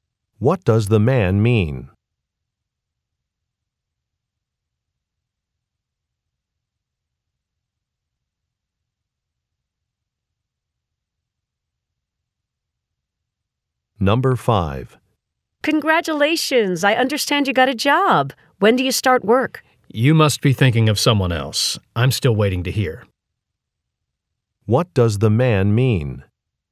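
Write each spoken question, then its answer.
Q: What does the man mean?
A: He hasn't gotten a job yet.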